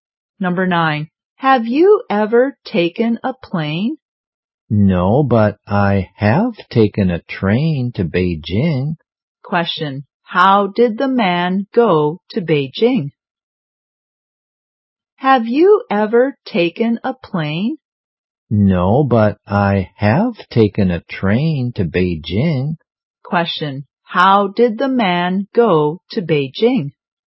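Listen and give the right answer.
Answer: By train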